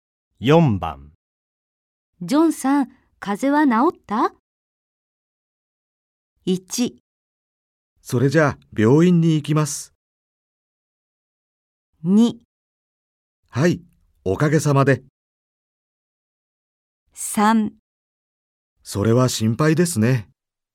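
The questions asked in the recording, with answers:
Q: ジョンさん、風邪は治った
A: 2: はい、おかげさまで。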